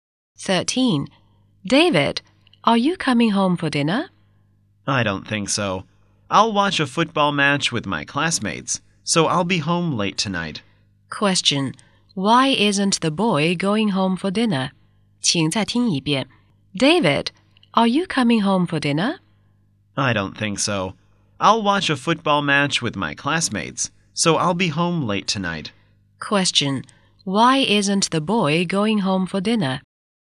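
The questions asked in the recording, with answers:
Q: Why isn't the boy going home for dinner?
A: He will watch a football match with his classmates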